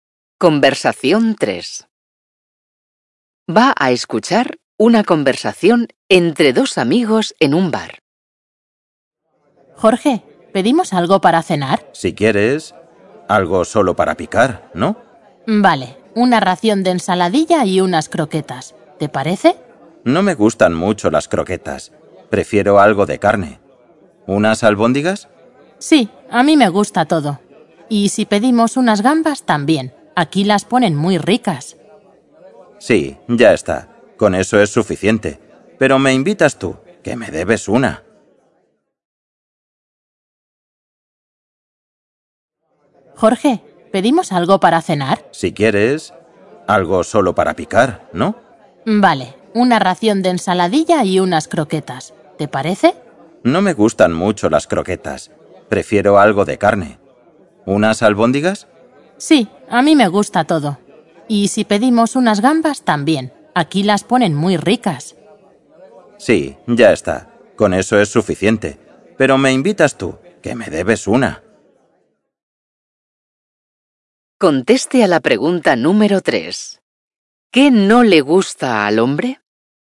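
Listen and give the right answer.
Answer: Las croquetas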